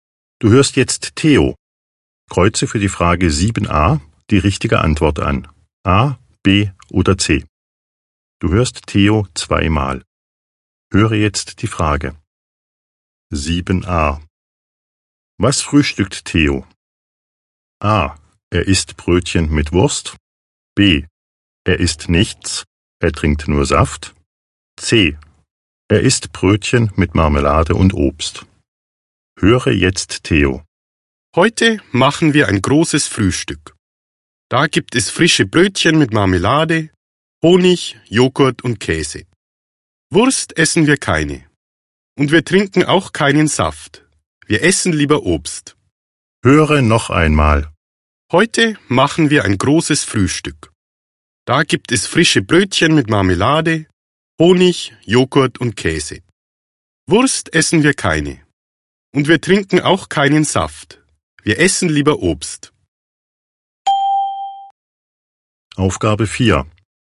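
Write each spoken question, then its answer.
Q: Was frühstückt Theo?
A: C: Er isst Brötchen mit Marmelade und Obst.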